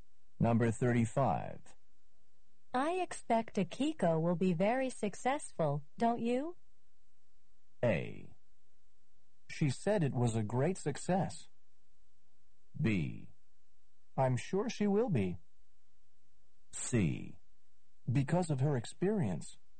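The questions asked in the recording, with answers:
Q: I expect Akiko will be very successful, don't you?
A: B: I'm sure she will be.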